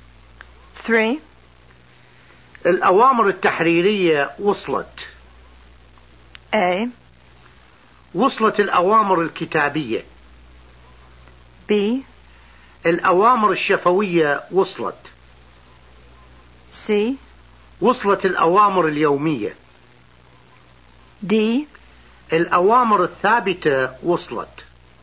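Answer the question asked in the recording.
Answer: A: وصلت الأوامر الكتابية.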